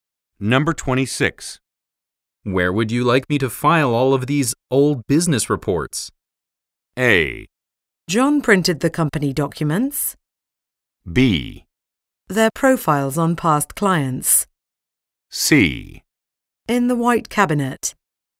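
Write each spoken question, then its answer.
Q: Where would you like me to file all of these old business reports?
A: C: In the white cabinet.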